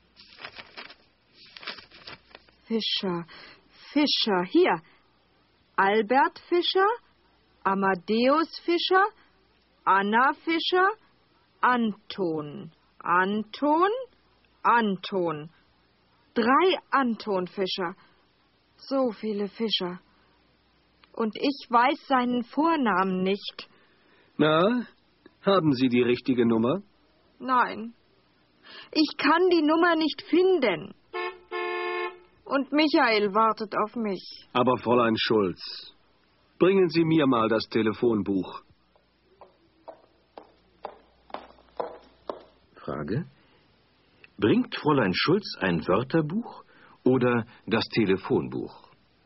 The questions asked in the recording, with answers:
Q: Bringt Fräulein Schulz ein Wörterbuch oder das Telefonbuch?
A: Sie bringt das Telefonbuch.